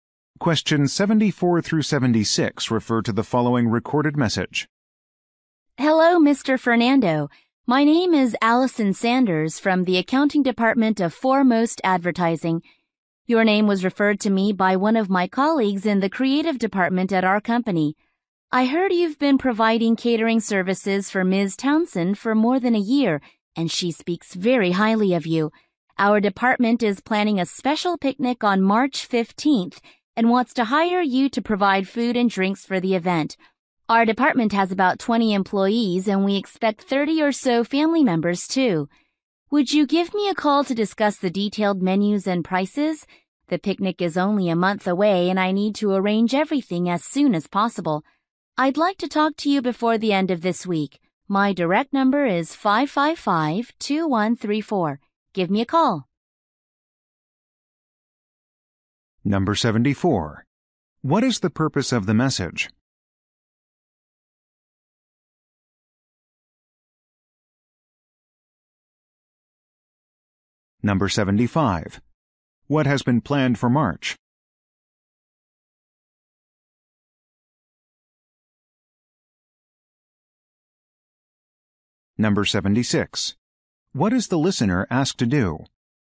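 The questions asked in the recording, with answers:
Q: What is the purpose of the message?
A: To hire a caterer for a picnic

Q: What has been planned for March?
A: A department picnic

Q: What is the listener asked to do?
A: Call her back before the end of the week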